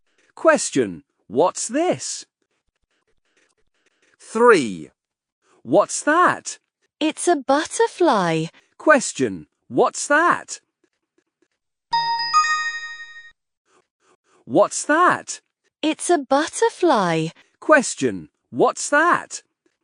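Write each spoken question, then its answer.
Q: Question, what's that?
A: a butterfly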